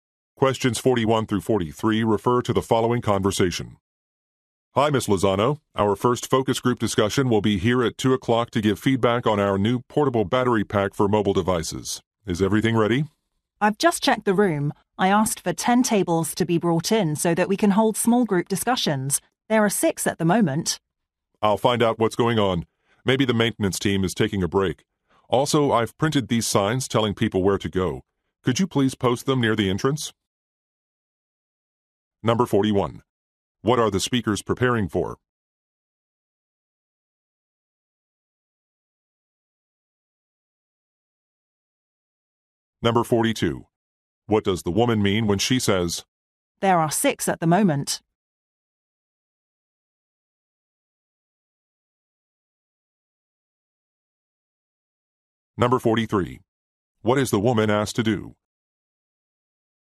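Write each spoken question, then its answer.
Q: What are the speakers preparing for?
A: A focus group discussion

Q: What does the woman mean when she says, "There are 6 at the moment"?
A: Some tables are still missing

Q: What is the woman asked to do?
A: Post signs near the entrance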